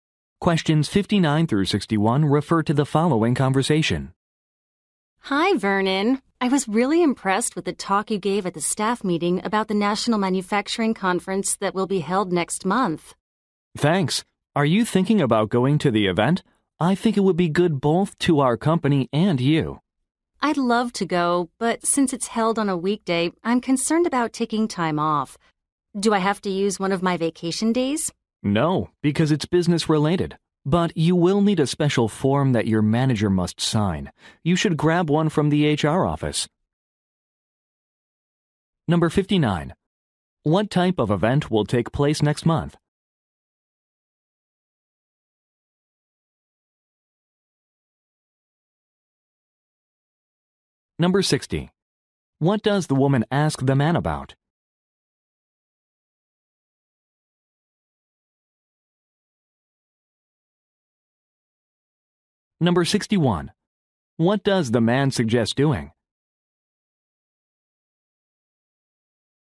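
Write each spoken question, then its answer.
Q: What type of event will take place next month?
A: A manufacturing conference

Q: What does the woman ask the man about?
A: Whether she must use a vacation day

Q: What does the man suggest doing?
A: Getting a form from the HR office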